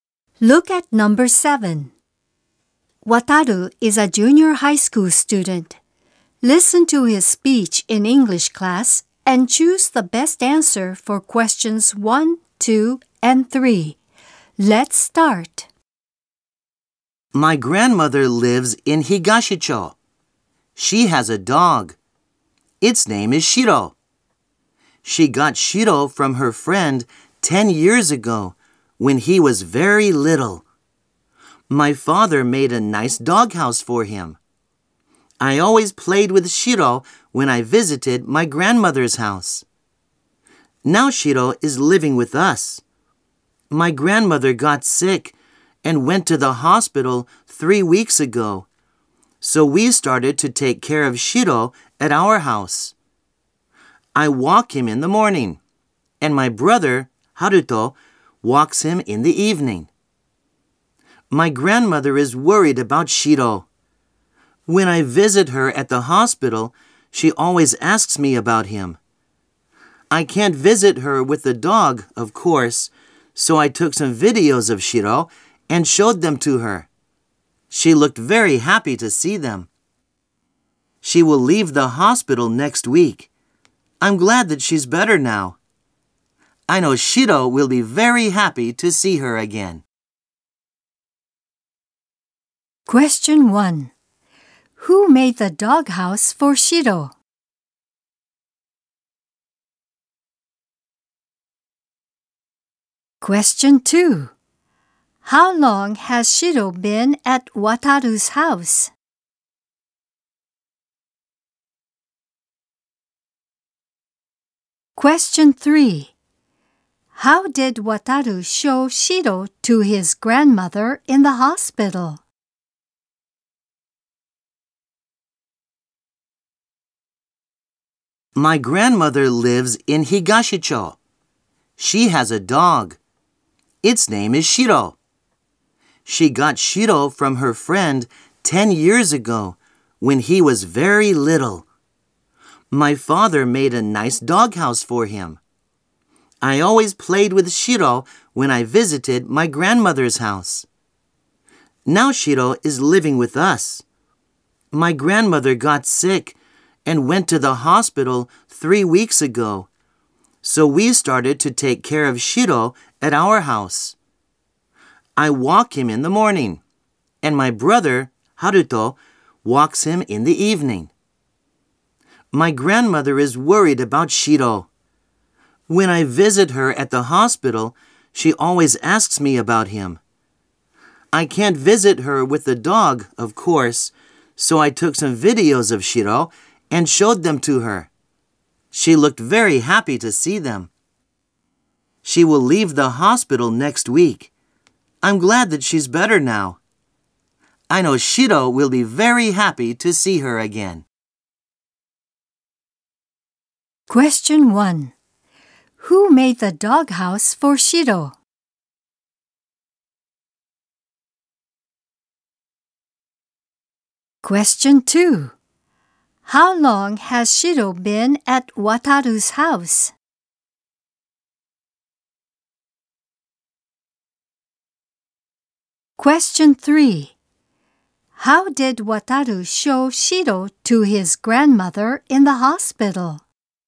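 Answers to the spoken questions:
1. Wataru's father
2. For three weeks
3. He showed her videos of Shiro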